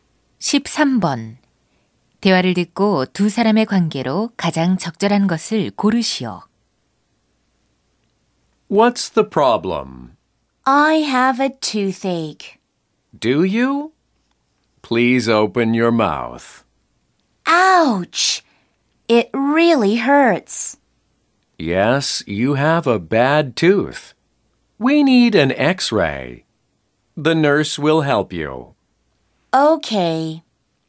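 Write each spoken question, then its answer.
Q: 대화를 듣고 두 사람의 관계로 가장 적절한 것을 고르시오.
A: 치과의사 - 환자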